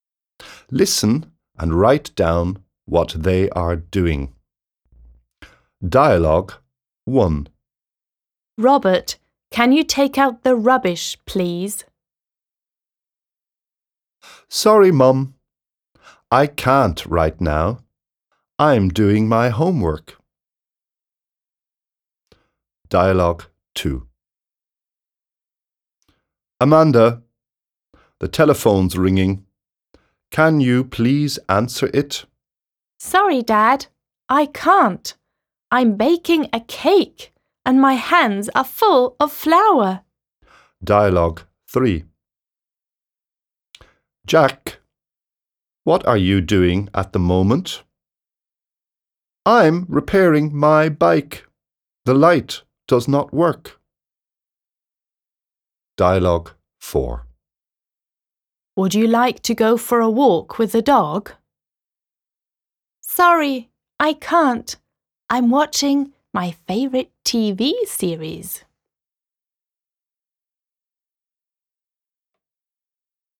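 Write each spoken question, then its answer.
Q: Listen and write down what they are doing.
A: Robert is doing his homework

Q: Listen and write down what they are doing.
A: Amanda is baking a cake

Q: Listen and write down what they are doing.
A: Jack is repairing his bike

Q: Listen and write down what they are doing.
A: Watching a favourite TV series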